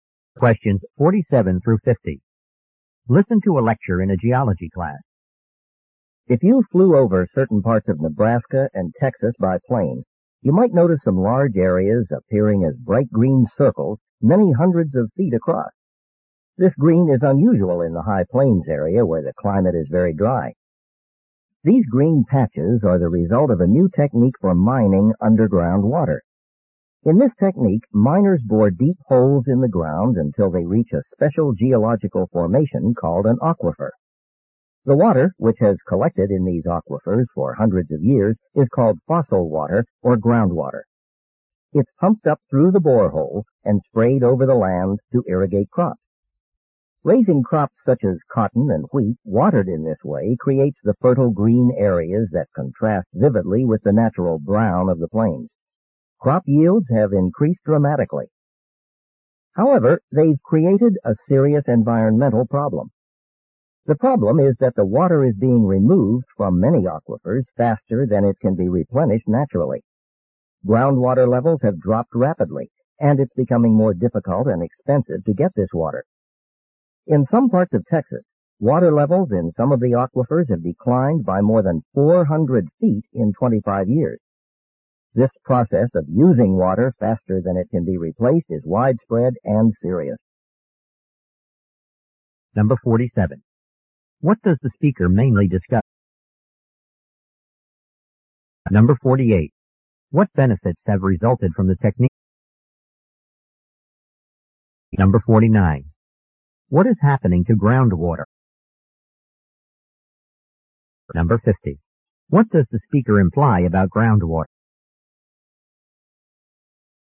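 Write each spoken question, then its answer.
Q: What does the speaker mainly discuss?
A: Mining groundwater from aquifers for irrigation and the problems it causes.

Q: What benefits have resulted from the technique?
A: Crop yields have increased dramatically.

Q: What is happening to groundwater?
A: Its levels are dropping rapidly.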